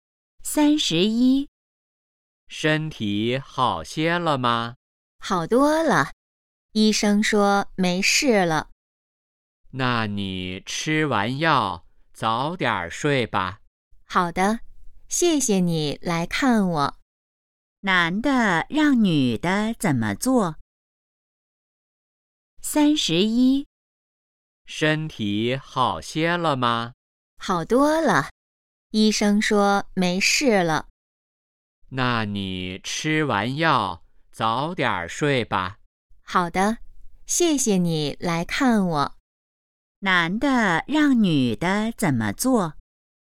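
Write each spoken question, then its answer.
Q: 男的让女的怎么做?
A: 吃完药早点睡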